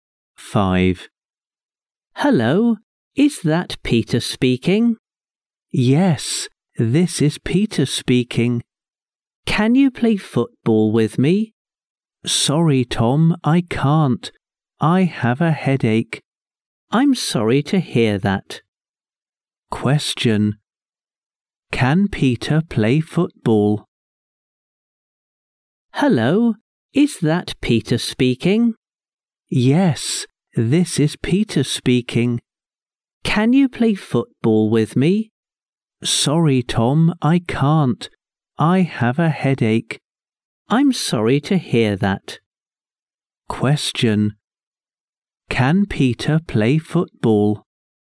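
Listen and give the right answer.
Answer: No, he can't.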